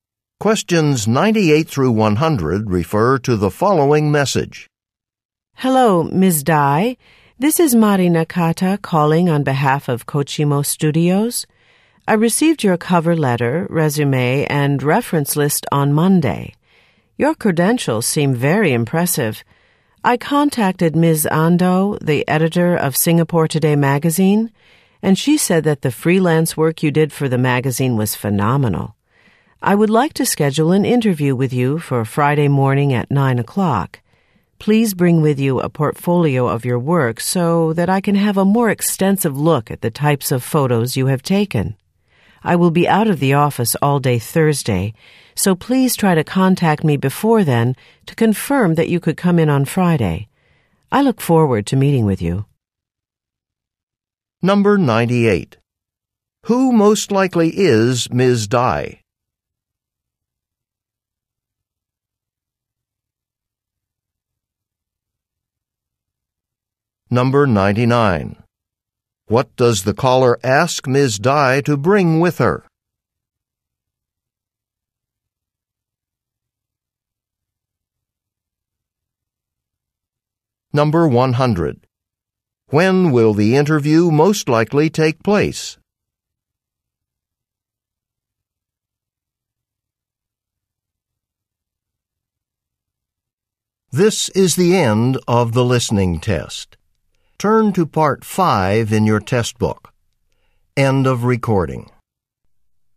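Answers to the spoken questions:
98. A photographer
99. A portfolio of her work
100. Friday morning at 9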